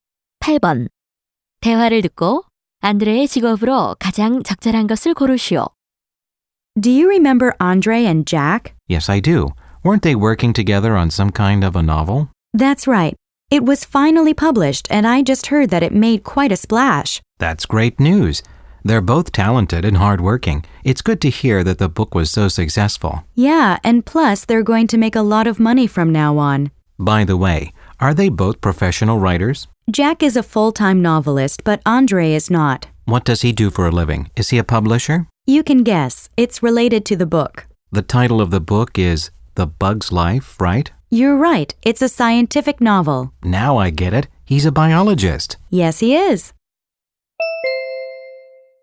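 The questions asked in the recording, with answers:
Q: 대화를 듣고 안드레의 직업으로 가장 적절한 것을 고르시오.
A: 생물학자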